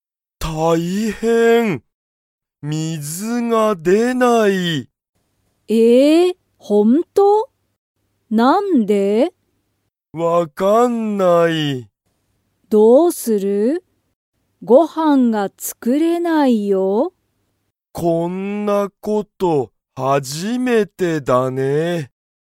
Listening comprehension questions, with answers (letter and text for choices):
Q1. かおりは今いま、ご飯(はん)を作(つく)れますか?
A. はい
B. いいえ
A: B. いいえ

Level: Level 1